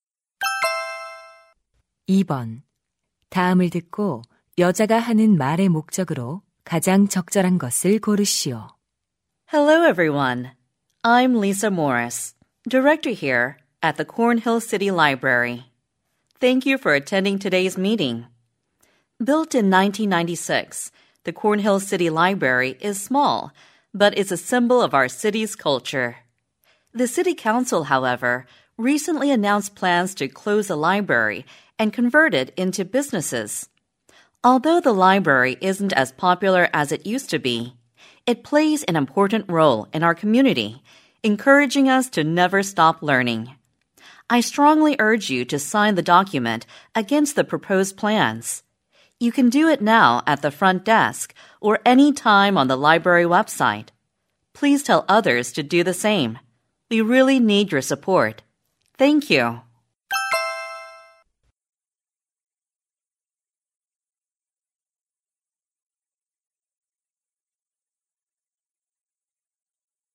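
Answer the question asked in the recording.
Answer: 도서관 폐쇄 계획에 반대하는 서명을 요청하려고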